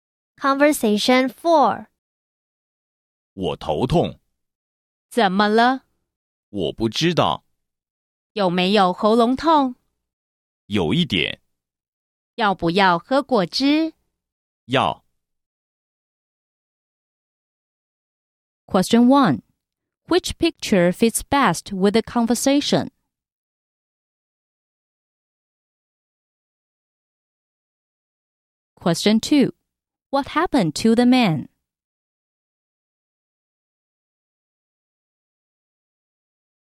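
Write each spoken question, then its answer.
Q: What happened to the man?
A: He has a headache and a slightly sore throat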